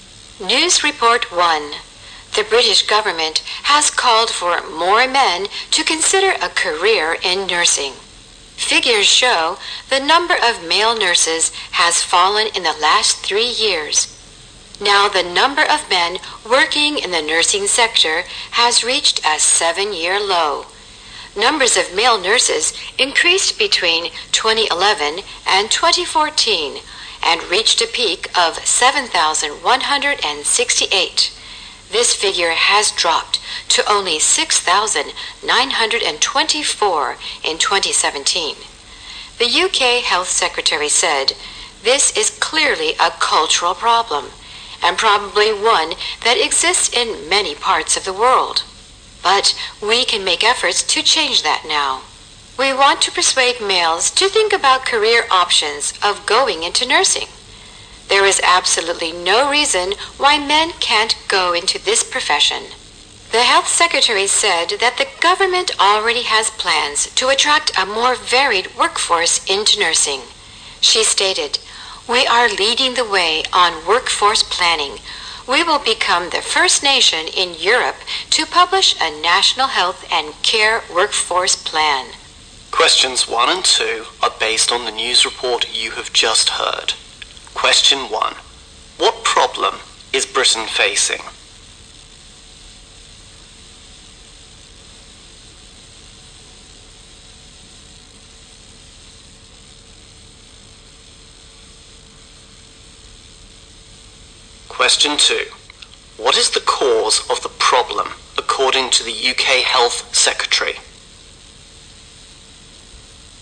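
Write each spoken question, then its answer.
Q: What problem is Britain facing?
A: The number of male nurses has fallen to a 7-year low.

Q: What is the cause of the problem, according to the UK Health Secretary?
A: It is a cultural problem.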